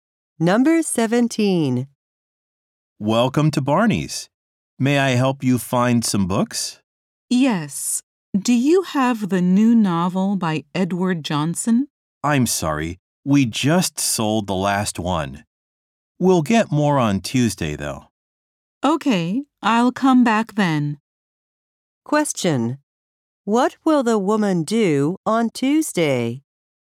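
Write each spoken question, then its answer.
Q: What will the woman do on Tuesday?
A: Come back to the bookstore to buy the novel.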